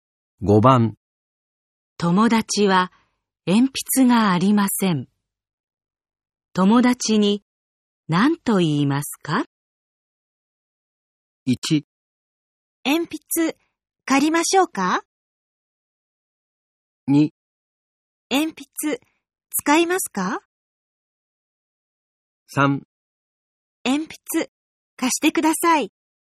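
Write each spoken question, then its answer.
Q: 友達は鉛筆がありません。友達に何と言いますか?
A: 2: 鉛筆使いますか?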